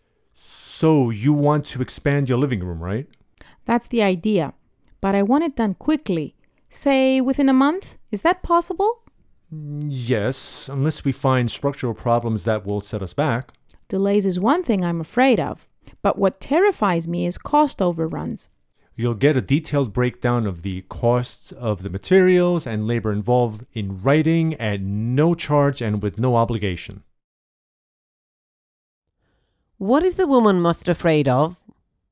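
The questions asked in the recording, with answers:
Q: What is the woman most afraid of?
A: Cost overruns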